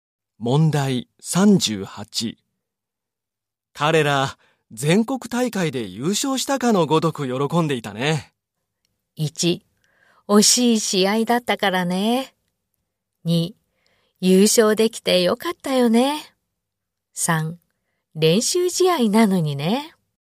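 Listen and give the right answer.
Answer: 3: 練習試合なのにね。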